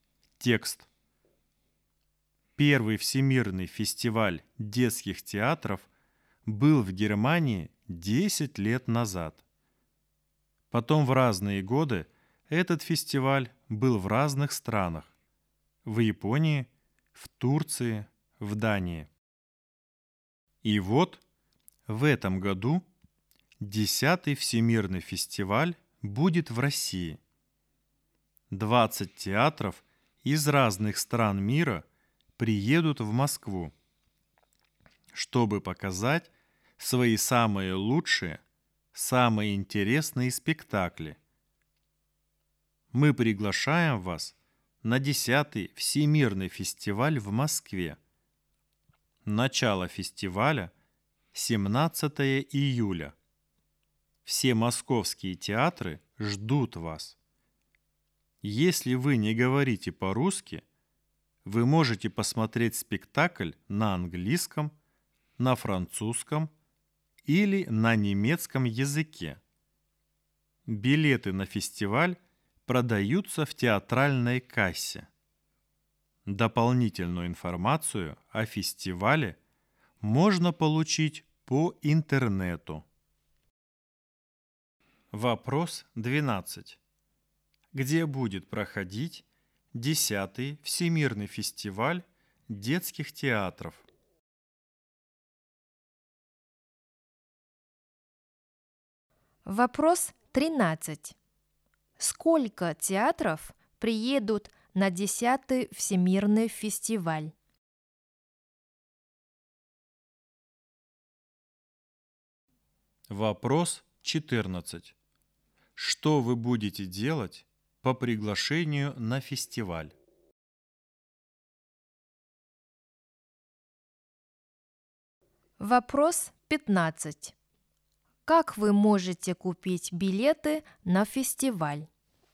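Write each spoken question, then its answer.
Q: Где будет проходить 10-й Всемирный фестиваль детских театров?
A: в Москве

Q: Сколько театров приедут на 10-й Всемирный фестиваль?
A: 20

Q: Как вы можете купить билеты на фестиваль?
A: в театральной кассе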